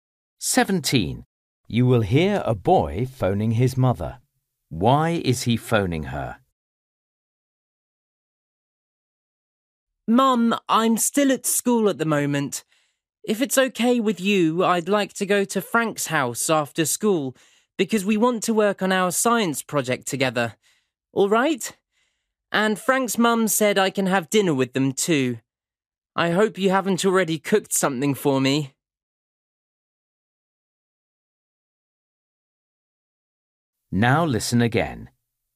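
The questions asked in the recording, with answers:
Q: Why is he phoning her?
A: To ask if he can go to Frank's house after school (and have dinner there)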